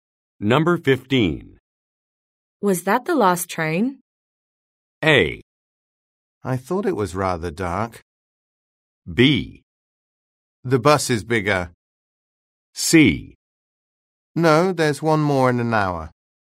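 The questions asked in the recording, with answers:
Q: Was that the last train?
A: C: No, there's one more in an hour.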